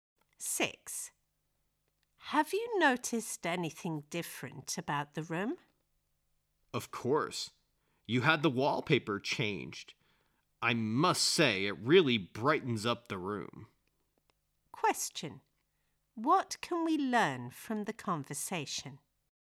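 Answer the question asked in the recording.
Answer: The wallpaper was changed and the room looks brighter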